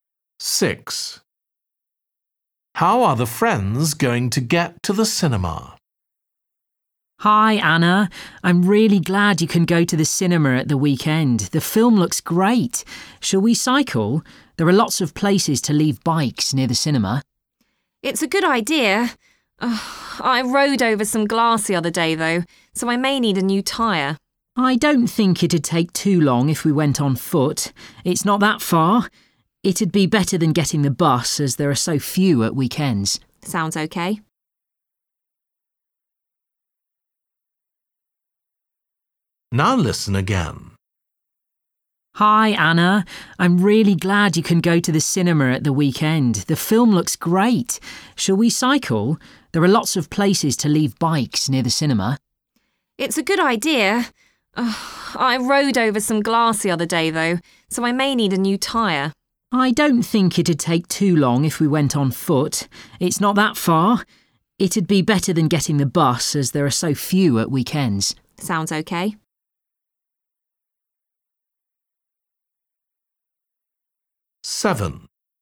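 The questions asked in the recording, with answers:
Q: How are the friends going to get to the cinema?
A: On foot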